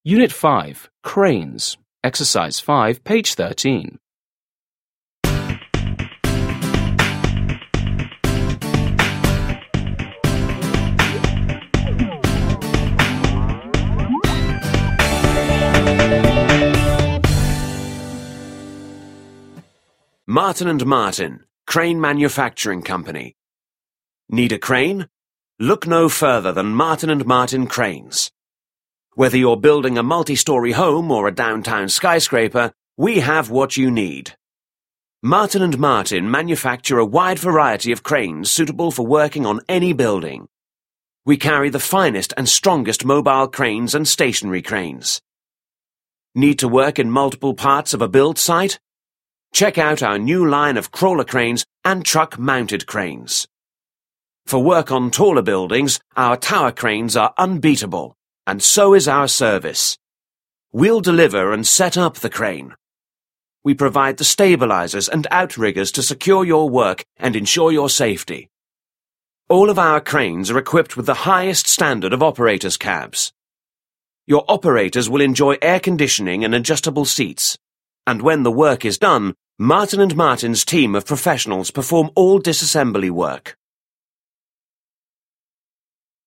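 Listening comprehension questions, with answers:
5. Listen and read the manufacturer's brochure again. What are the benefits of a crawler cranes?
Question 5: What are the benefits of a crawler cranes?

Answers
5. They let you work in multiple parts of a build site.

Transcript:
Martin&Martin
CRANE MANUFACTURING COMPANY
Need a crane? Look no further than Martin and Martin Cranes. Whether you're building a multi-story home or a downtown skyscraper, we have what you need.
Martin and Martin manufacture a wide variety of cranes suitable for working on any building. We carry the finest and strongest mobile cranes and stationary cranes.
Need to work in multiple parts of a build Site? Check out our new line of crawler cranes and truck mounted cranes.
For work on taller buildings, our tower cranes are unbeatable. And so is our service. We'll deliver and set up the crane. We provide the stabilizers and outriggers to secure your work and ensure your safety. 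All of our cranes are equipped with the highest standard of operator's cabs. Your operators will enjoy air conditioning and adjustable seats. And when the work is done, Martin and Martin's team of professionals perform all disassembly work.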